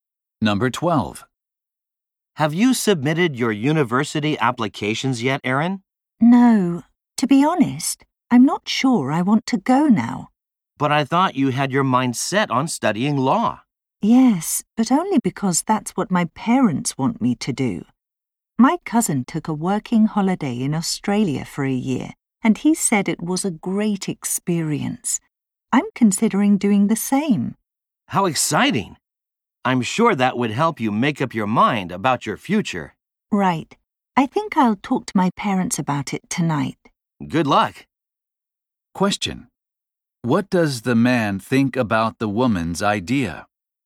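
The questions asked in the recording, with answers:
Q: What does the man think about the woman's idea?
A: It would help her decide about her future.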